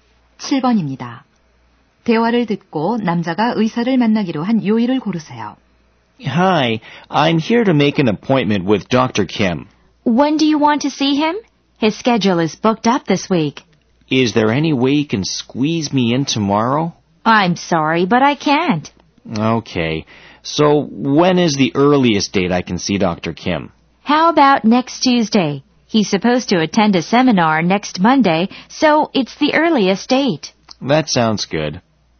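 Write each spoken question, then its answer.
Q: 대화를 듣고 남자가 의사를 만나기로 한 요일을 고르세요.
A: 다음 주 화요일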